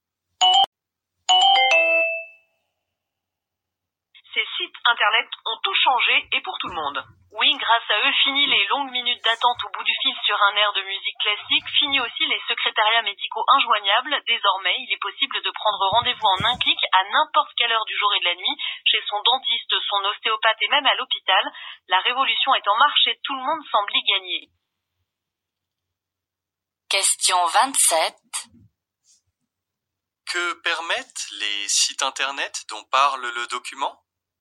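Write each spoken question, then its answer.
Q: Que permettent les sites internet dont parle le document ?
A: Prendre rendez-vous médical en un clic à toute heure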